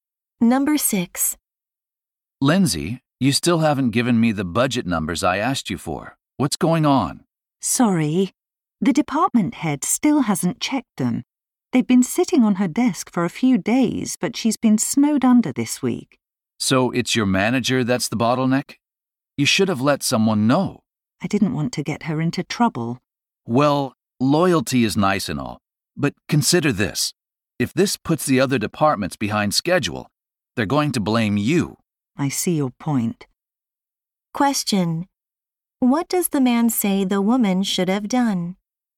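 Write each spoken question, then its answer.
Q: Question: What does the man say the woman should have done?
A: Told someone that her manager was holding up the budget numbers.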